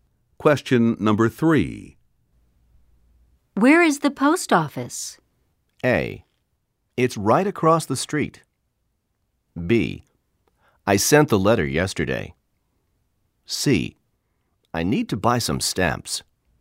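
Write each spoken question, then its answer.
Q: Where is the post office?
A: A: It's right across the street.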